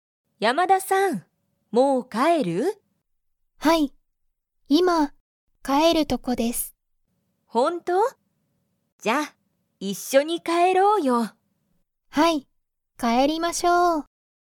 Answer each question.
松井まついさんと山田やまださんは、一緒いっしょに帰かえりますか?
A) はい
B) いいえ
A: はい

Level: Level 1

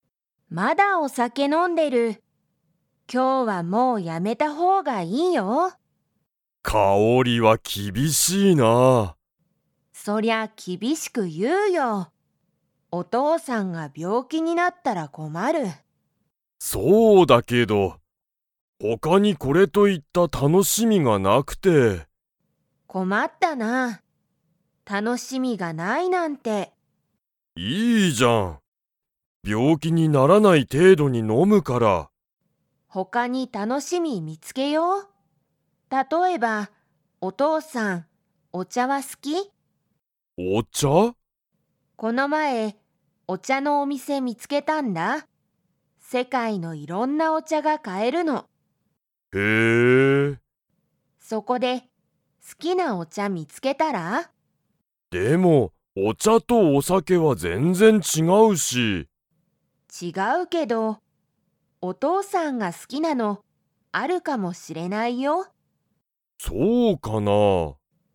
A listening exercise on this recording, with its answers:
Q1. お父とうさんは、お酒さけの他ほかに楽たのしみが 。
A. ある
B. ない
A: ない

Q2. カオリはこの前まえ、何なんのお店みせを見みつけましたか?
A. お酒さけ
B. 病気びょうき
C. お茶ちゃ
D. ご飯はん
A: お茶ちゃ

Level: Level 3

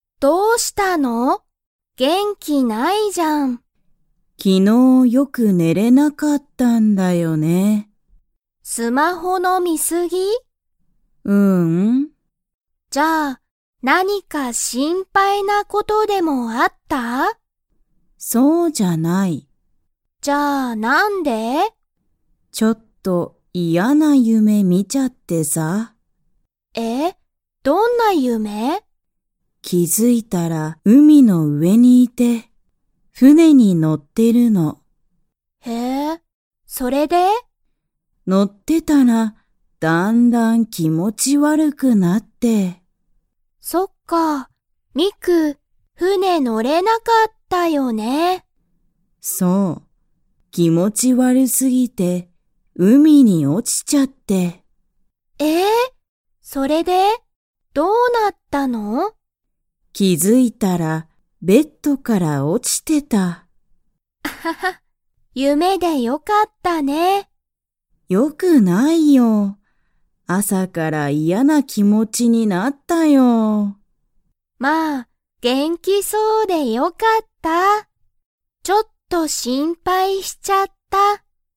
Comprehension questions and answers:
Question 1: 夢ゆめの中なかで、ミクは何なにに乗のってましたか?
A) 電車でんしゃ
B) 車くるま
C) 自転車じてんしゃ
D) 船ふね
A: 船ふね

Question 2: ミクは、ベッドから 。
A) 落おちた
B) 落おちなかった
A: 落おちた

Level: Level 3

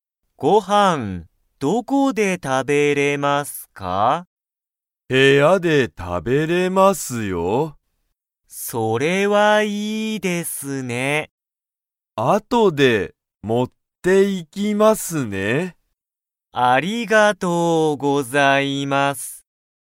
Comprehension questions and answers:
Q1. ハルトは____でご飯(はん)を食(た)べる。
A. 海(うみ)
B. 店(みせ)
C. レストラン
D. 部屋(へや)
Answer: 部屋(へや)

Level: Level 1

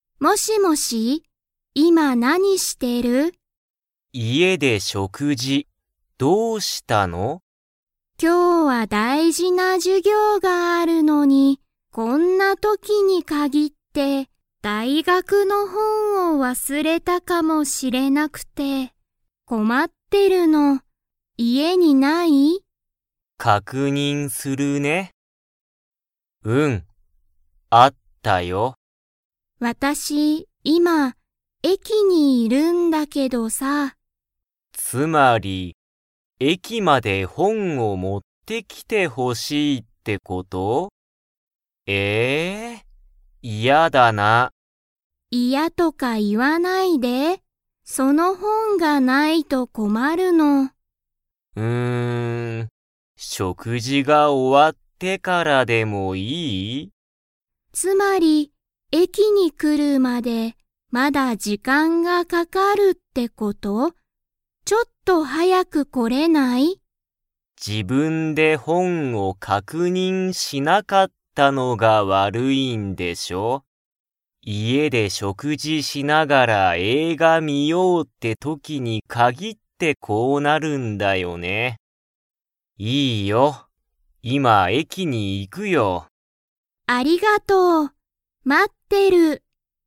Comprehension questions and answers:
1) 姉あねは、何なにを忘わすれましたか?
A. 駅えき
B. 授業じゅぎょう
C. 映画えいが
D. 大学だいがくの本ほん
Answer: 大学だいがくの本ほん

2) 弟おとうとは、 駅えきに行いく。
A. 食事しょくじが終おわったら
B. 今いますぐ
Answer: 今いますぐ

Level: Level 3

